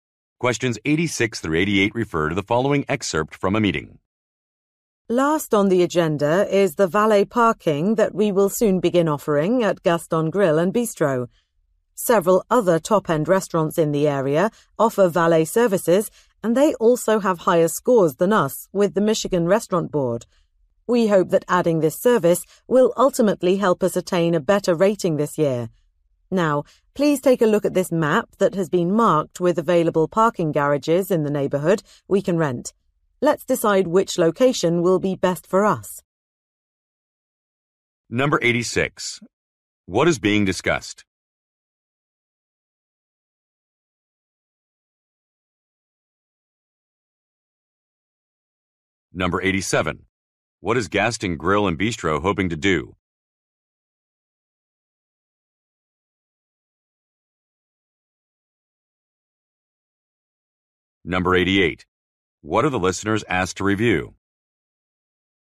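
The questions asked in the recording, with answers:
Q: What is being discussed?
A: A new valet parking service

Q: What is Gaston Grill and Bistro hoping to do?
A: Get a better rating

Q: What are the listeners asked to review?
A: A map of parking garages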